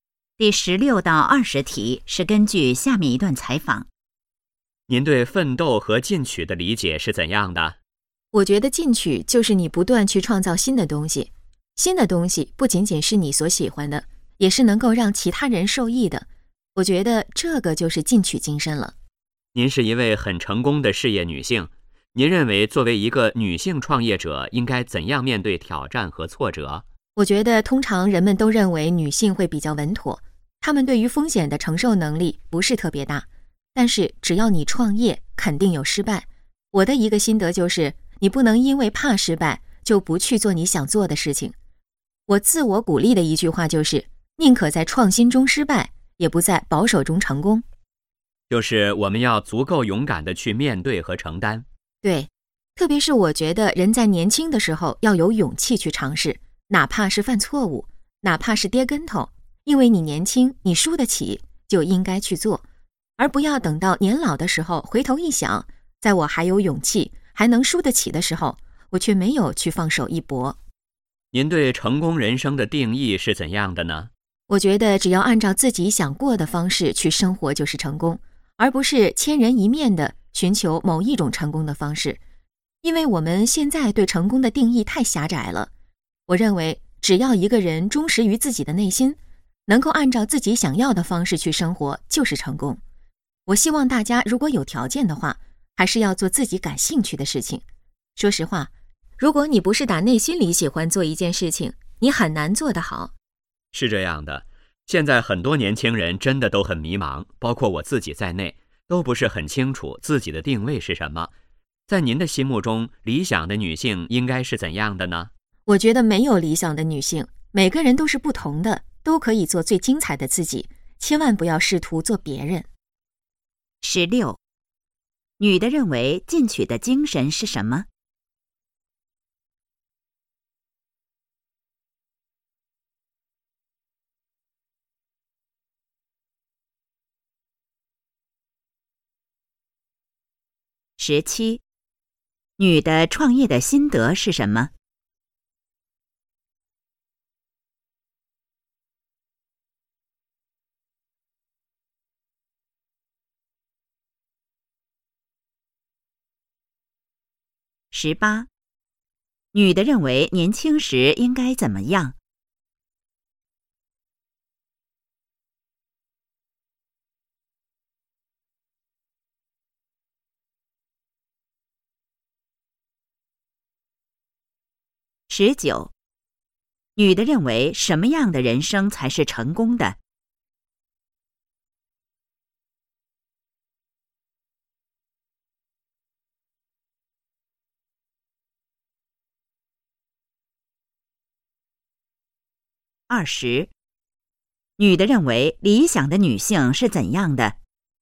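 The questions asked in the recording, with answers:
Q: 女的认为进取的精神是什么?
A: 不断去创造新的东西,并且能让其他人受益

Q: 女的创业的心得是什么?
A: 不能因为怕失败就不去做想做的事情

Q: 女的认为年轻时应该怎么样?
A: 要有勇气去尝试

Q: 女的认为什么样的人生才是成功的?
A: 按照自己想要的方式去生活

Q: 女的认为理想的女性是怎样的?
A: 没有理想的女性,每个人都可以做最精彩的自己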